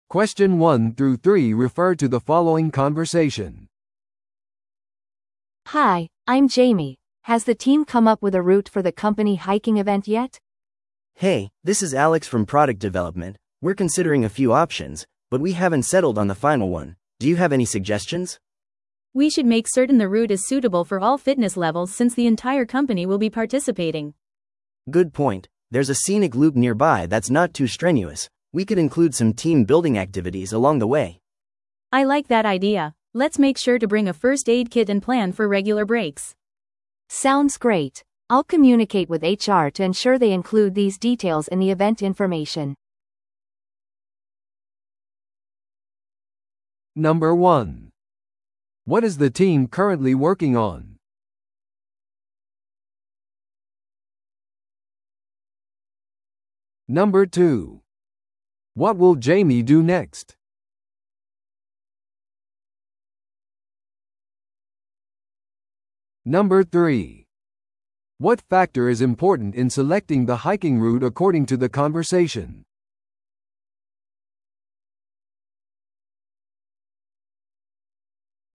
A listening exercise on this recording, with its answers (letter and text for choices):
Listen to the audio below and answer the questions.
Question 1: What is the team currently working on?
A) イベントのフィットネスコーチの選択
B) テスト用の製品プロトタイプの作成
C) 適切なハイキングルートの選定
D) アウトドアマーケティングキャンペーンの計画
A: C) 適切なハイキングルートの選定

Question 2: What will Jamie do next?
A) 参加者リストを最終決定する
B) イベントの詳細について人事部と調整する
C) チームビルディングの活動を主導する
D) ハイキング場所への交通手段を整える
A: B) イベントの詳細について人事部と調整する

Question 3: What factor is important in selecting the hiking route according to the conversation?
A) ルート上での携帯電話のサービスの可用性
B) すべてのフィットネスレベルとの互換性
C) 写真撮影のための景観の良い見晴らし点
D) 最寄りの病院までの距離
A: B) すべてのフィットネスレベルとの互換性

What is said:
A: Hi, I'm Jamie. Has the team come up with a route for the company hiking event yet?
B: Hey, this is Alex from product development. We're considering a few options, but we haven't settled on the final one. Do you have any suggestions?
C: We should make certain the route is suitable for all fitness levels since the entire company will be participating.
B: Good point. There's a scenic loop nearby that's not too strenuous. We could include some team-building activities along the way.
C: I like that idea. Let's make sure to bring a first aid kit and plan for regular breaks.
A: Sounds great. I'll communicate with HR to ensure they include these details in the event information.